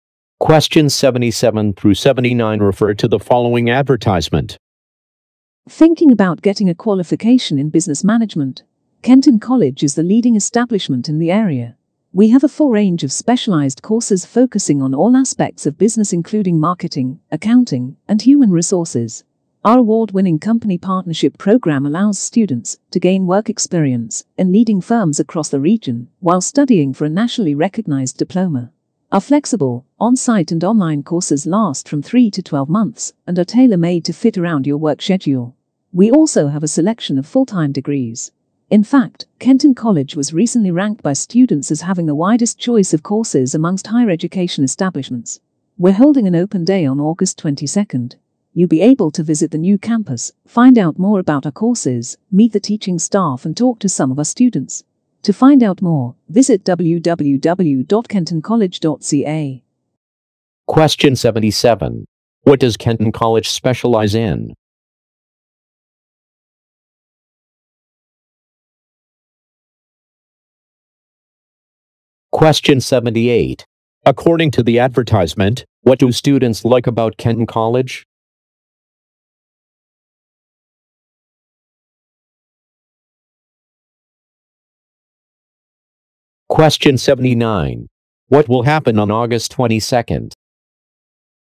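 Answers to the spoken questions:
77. Business management
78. The wide choice of courses
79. An open day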